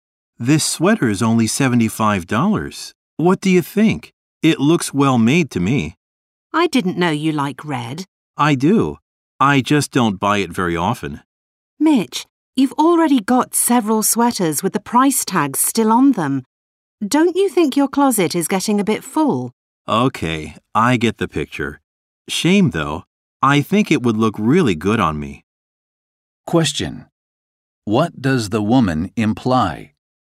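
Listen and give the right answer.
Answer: The man shouldn't buy the sweater because he already has many unworn sweaters.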